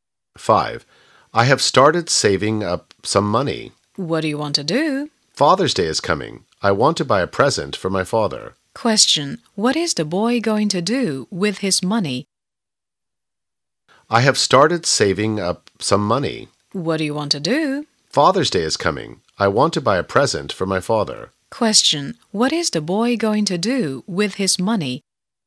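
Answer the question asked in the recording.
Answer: Buy a present for his father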